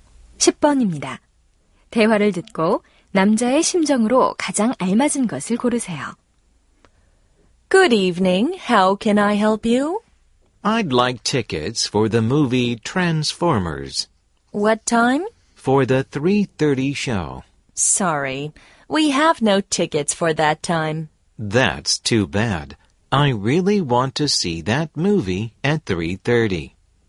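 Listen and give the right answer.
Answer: 실망함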